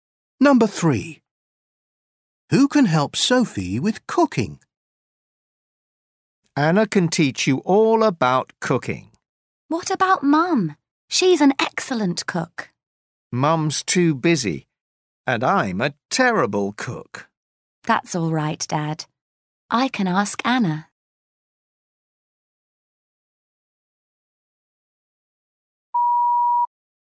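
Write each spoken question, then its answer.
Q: Who can help Sophie with cooking?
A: Anna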